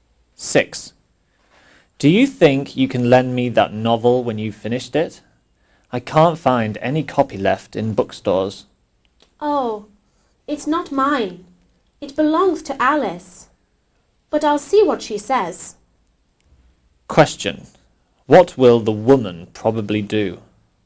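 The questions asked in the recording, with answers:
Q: What will the woman probably do?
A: Ask Alice if she can lend the novel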